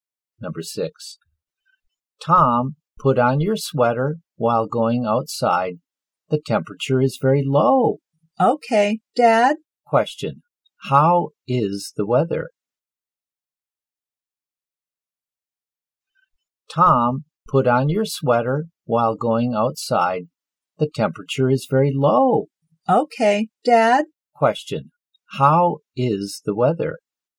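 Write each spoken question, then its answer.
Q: How is the weather?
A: Cold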